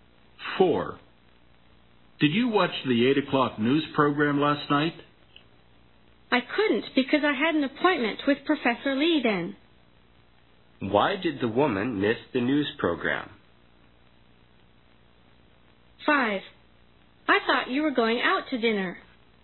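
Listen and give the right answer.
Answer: She had an appointment with Professor Lee.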